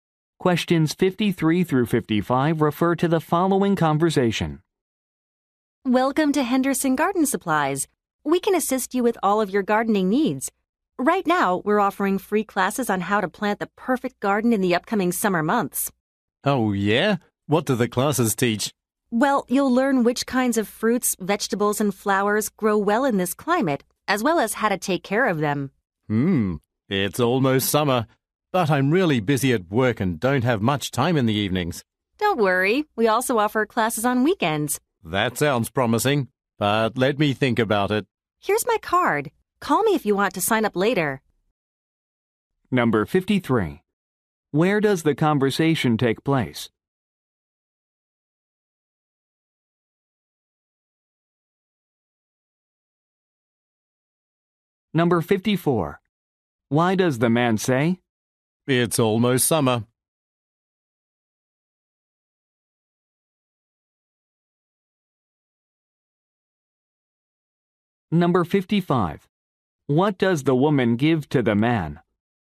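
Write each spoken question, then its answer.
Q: Where does the conversation take place?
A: At a garden supply store

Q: What does the woman give to the man?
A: Her card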